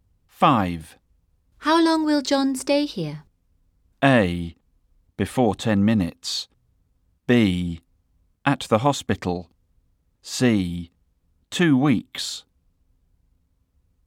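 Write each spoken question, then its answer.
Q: How long will John stay here?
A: C: 2 weeks.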